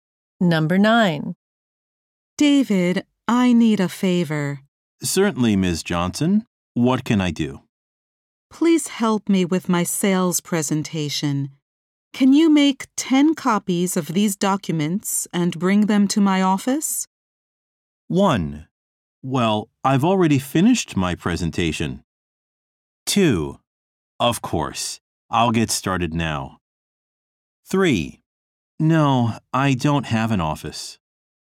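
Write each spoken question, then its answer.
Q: Can you make 10 copies of these documents and bring them to my office?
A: 2: Of course. I'll get started now.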